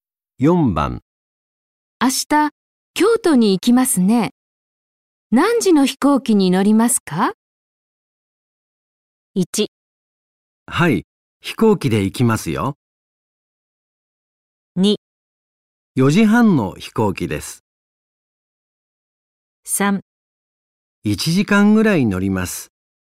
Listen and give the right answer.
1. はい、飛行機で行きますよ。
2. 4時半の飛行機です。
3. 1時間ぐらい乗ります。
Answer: 2. 4時半の飛行機です。

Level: N5 Listening · Test 1